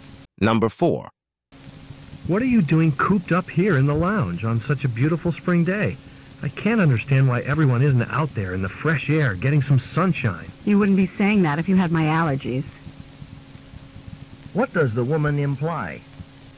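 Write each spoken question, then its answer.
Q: What does the woman imply?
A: She stays inside because of her allergies.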